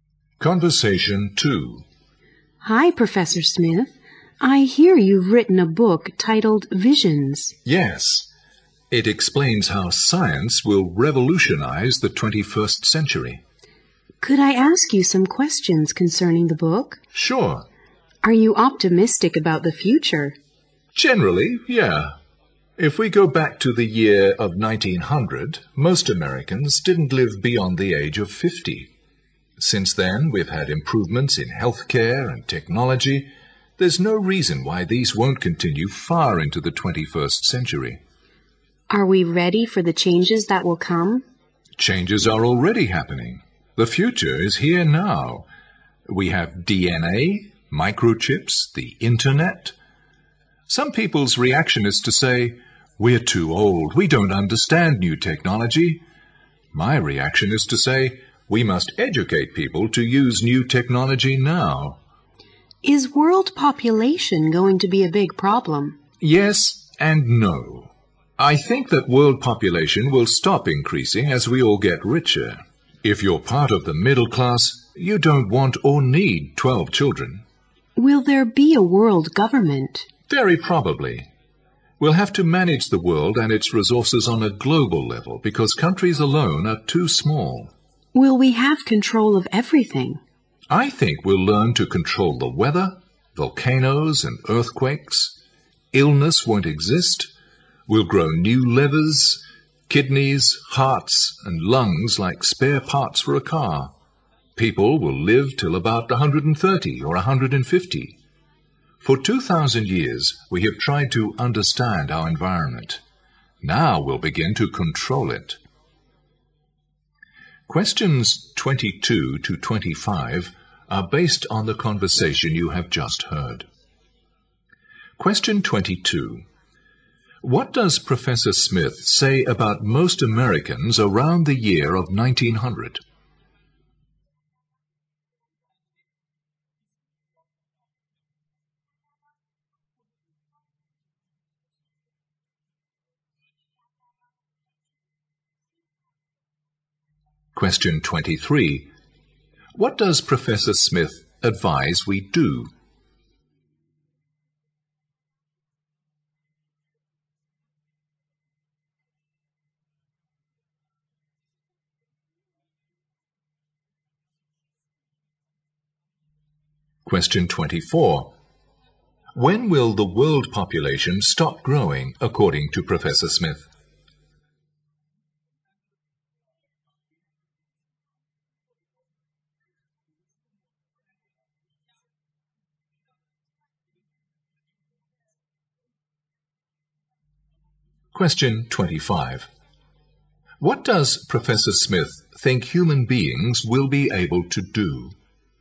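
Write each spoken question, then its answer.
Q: What does Professor Smith say about most Americans around the year of 1900?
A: They didn't live beyond the age of 50.

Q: What does Professor Smith advise we do?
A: Educate people to use new technology now.

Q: When will the world population stop growing, according to Professor Smith?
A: When we all get richer.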